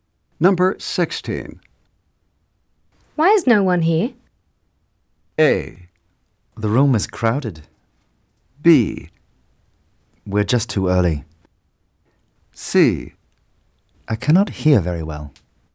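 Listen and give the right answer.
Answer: B: We're just too early.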